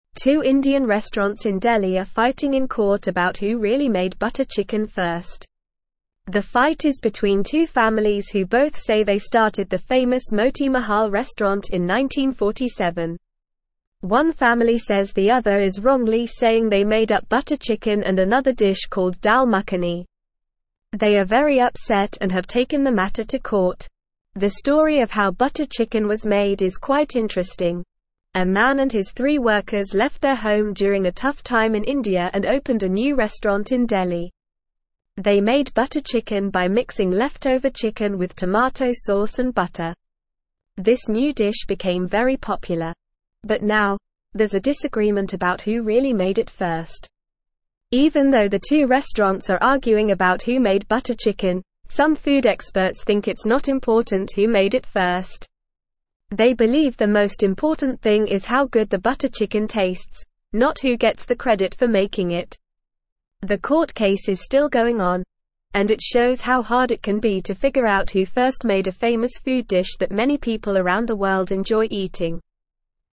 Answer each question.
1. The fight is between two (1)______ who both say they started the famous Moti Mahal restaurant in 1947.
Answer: families

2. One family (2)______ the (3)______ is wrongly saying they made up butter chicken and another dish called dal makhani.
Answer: says

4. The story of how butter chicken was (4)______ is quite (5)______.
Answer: made

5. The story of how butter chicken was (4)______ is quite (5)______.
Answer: interesting

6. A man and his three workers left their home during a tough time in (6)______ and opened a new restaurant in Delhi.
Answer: India

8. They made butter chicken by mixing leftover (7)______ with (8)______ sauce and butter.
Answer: tomato

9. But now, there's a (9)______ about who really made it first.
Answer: disagreement

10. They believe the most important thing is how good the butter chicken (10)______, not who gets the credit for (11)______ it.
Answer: tastes

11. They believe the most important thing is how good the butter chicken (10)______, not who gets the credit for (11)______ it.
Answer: making

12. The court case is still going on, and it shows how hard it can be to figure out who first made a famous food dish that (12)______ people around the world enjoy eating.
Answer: many

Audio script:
Two Indian restaurants in Delhi are fighting in court about who really made butter chicken first. The fight is between two families who both say they started the famous Moti Mahal restaurant in 1947. One family says the other is wrongly saying they made up butter chicken and another dish called dal makhani. They are very upset and have taken the matter to court.
The story of how butter chicken was made is quite interesting. A man and his three workers left their home during a tough time in India and opened a new restaurant in Delhi. They made butter chicken by mixing leftover chicken with tomato sauce and butter. This new dish became very popular. But now, there's a disagreement about who really made it first.
Even though the two restaurants are arguing about who made butter chicken, some food experts think it's not important who made it first. They believe the most important thing is how good the butter chicken tastes, not who gets the credit for making it. The court case is still going on, and it shows how hard it can be to figure out who first made a famous food dish that many people around the world enjoy eating.

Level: Level 2